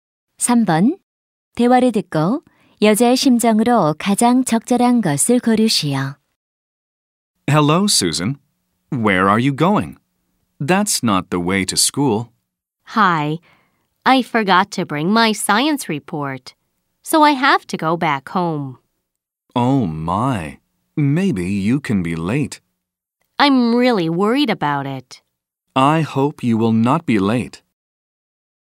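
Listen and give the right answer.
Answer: 걱정됨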